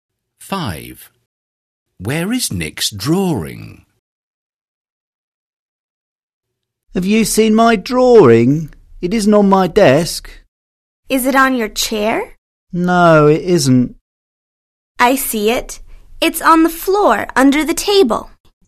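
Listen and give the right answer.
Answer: on the floor under the table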